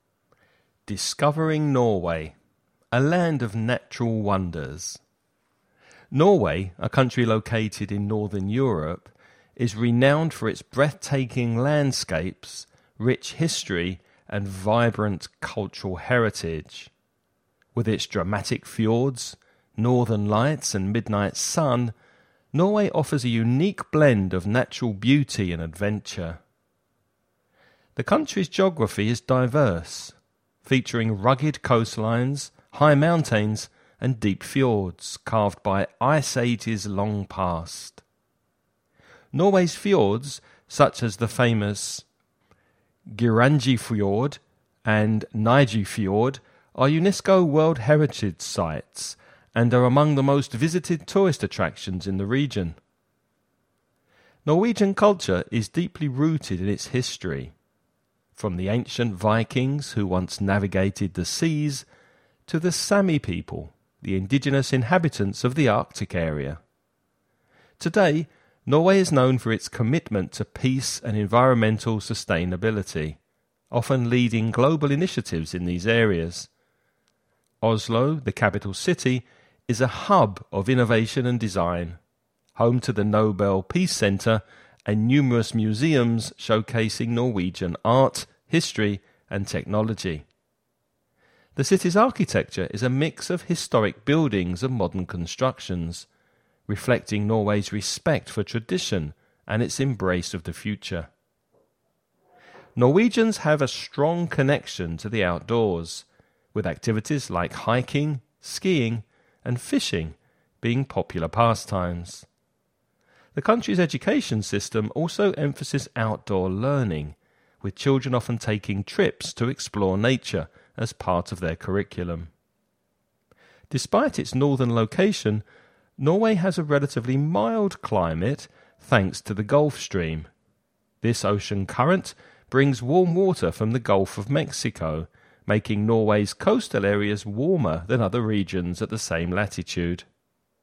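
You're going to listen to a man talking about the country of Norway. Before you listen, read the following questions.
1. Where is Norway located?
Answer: In northern Europe

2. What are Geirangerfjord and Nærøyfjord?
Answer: Famous fjords that are UNESCO World Heritage Sites

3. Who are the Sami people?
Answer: The indigenous inhabitants of the Arctic area

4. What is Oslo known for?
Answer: Being a hub of innovation and design, home to the Nobel Peace Center and many museums

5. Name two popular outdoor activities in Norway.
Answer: Hiking and skiing (also fishing)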